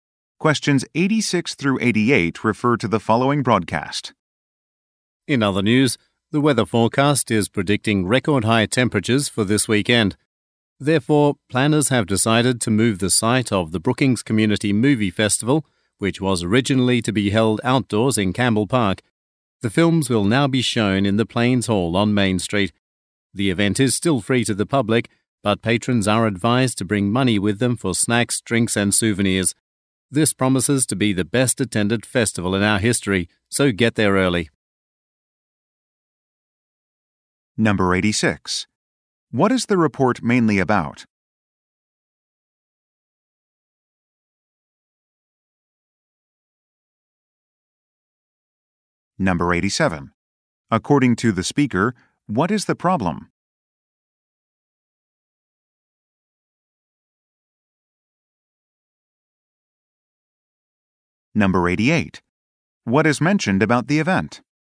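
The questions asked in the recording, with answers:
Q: What is the report mainly about?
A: A change of venue for the community movie festival

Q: According to the speaker, what is the problem?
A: Record high temperatures are forecast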